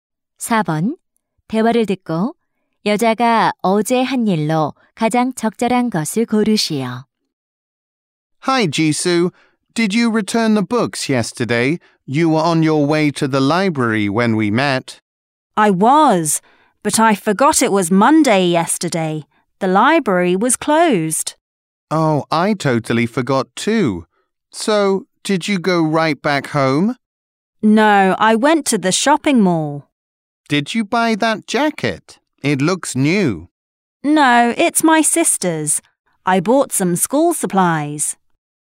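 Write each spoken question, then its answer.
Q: 대화를 듣고 여자가 어제 한 일로 가장 적절한 것을 고르시오.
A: 쇼핑몰에서 학용품 구입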